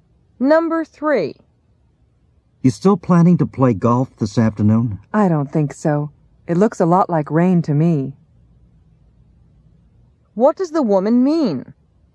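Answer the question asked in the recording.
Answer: She probably won't play golf because it looks like rain.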